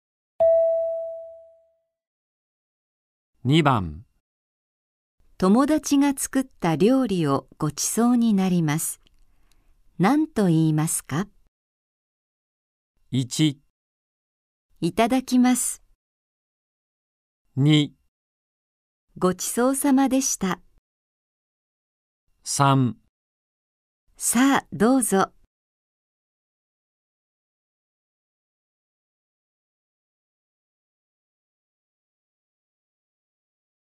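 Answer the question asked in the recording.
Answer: 1: いただきます。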